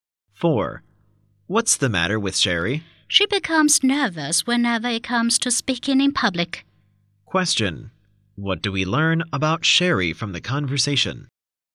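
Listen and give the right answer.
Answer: She gets nervous speaking in public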